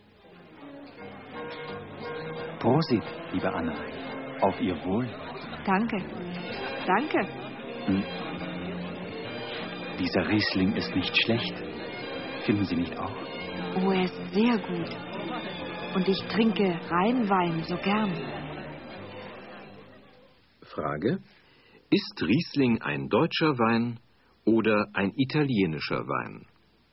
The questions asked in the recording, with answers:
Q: Frage: Ist Riesling ein deutscher Wein oder ein italienischer Wein?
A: Riesling ist ein deutscher Wein.